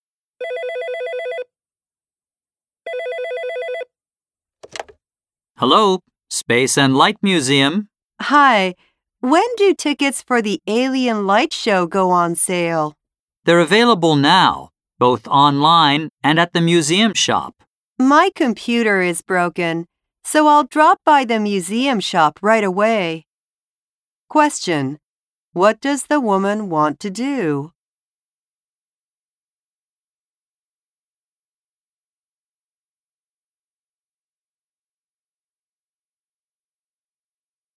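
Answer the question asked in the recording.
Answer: Buy tickets for the Alien Light Show at the museum shop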